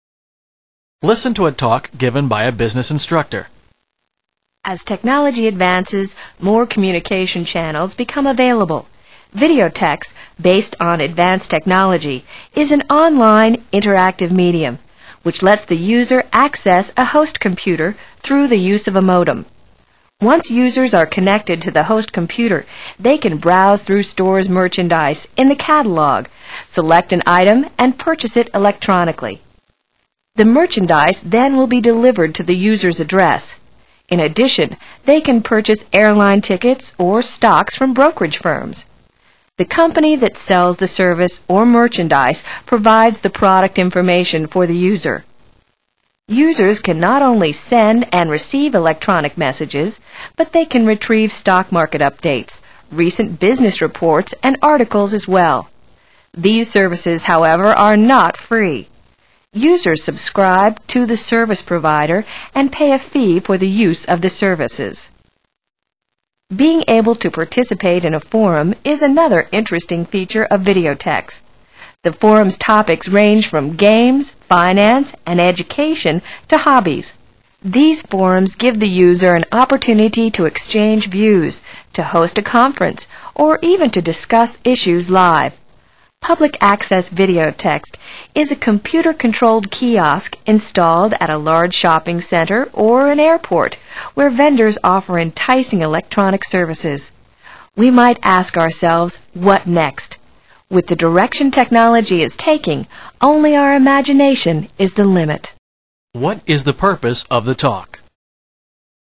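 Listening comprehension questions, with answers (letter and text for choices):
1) What is the purpose of the talk?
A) To identify business applications for electronic services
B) To explain a variety of on-line computerized services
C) To illustrate network communication difficulties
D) To project the revenue for information retrieval industry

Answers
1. B) To explain a variety of on-line computerized services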